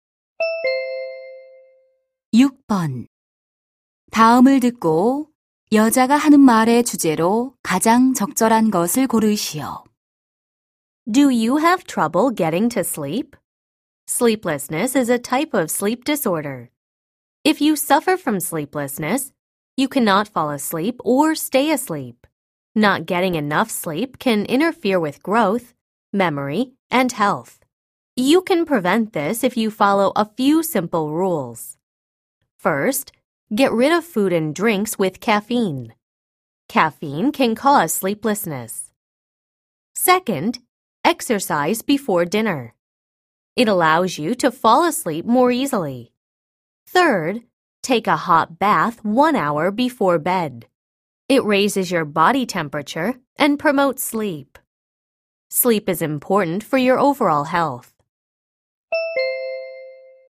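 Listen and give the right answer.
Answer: 불면증을 예방하는 방법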